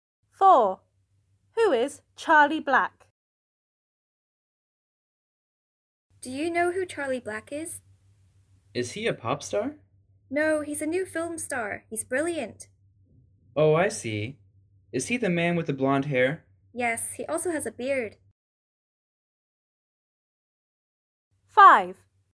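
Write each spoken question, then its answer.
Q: Who is Charlie Black?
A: A new film star with blonde hair and a beard.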